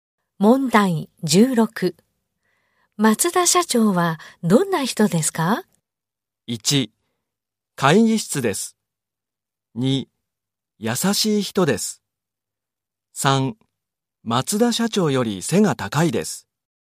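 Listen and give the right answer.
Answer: 2: 優しい人です。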